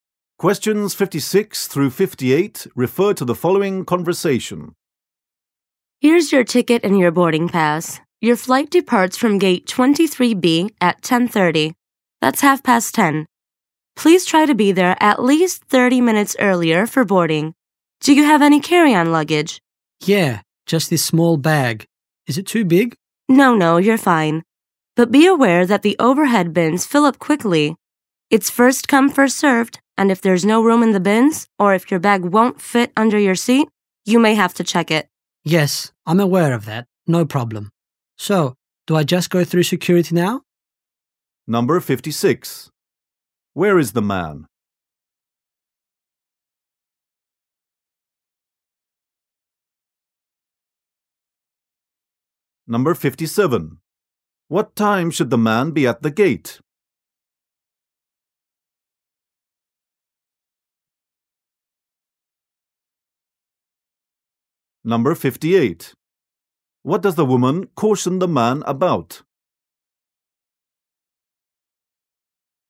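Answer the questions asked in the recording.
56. At an airport check-in counter
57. By 10:00
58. The overhead bins fill up quickly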